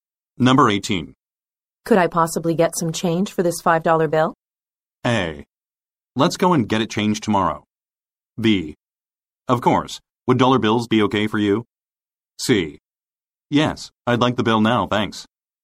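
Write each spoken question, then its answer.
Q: Could I possibly get some change for this $5 bill?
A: B: Of course. Would dollar bills be okay for you?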